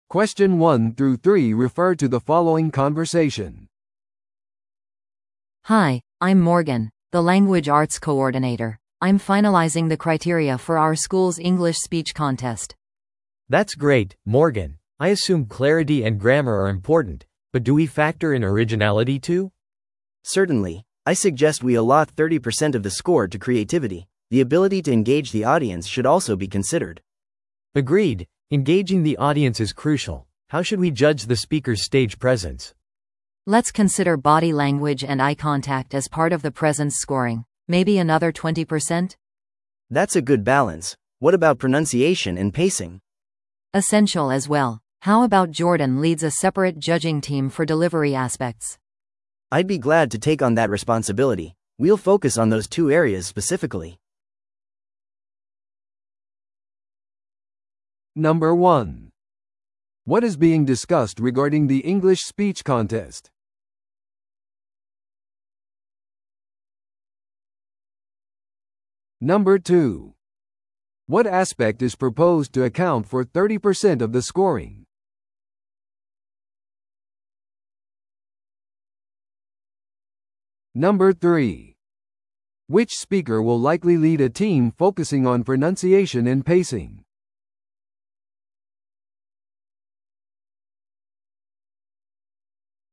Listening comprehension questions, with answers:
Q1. What is being discussed regarding the English speech contest?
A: 審査基準を決めること。

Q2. What aspect is proposed to account for 30% of the scoring?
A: 内容の創造性。

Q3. Which speaker will likely lead a team focusing on pronunciation and pacing?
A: ジョーダン。

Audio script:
A: Hi, I'm Morgan, the language arts coordinator. I'm finalizing the criteria for our school's English speech contest.
B: That's great, Morgan. I assume clarity and grammar are important, but do we factor in originality too?
C: Certainly. I suggest we allot 30% of the score to creativity. The ability to engage the audience should also be considered.
B: Agreed, engaging the audience is crucial. How should we judge the speakers' stage presence?
A: Let's consider body language and eye contact as part of the presence scoring. Maybe another 20%?
C: That's a good balance. What about pronunciation and pacing?
A: Essential as well. How about Jordan leads a separate judging team for delivery aspects?
C: I'd be glad to take on that responsibility. We'll focus on those two areas specifically.